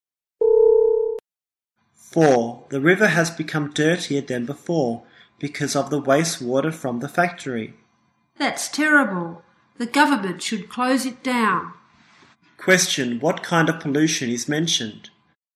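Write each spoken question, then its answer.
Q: Question, what kind of pollution is mentioned?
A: Water pollution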